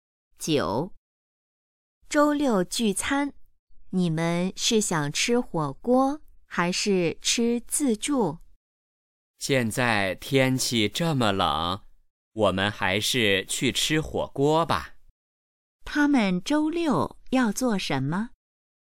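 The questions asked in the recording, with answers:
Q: 他们周六要做什么?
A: 聚餐,去吃火锅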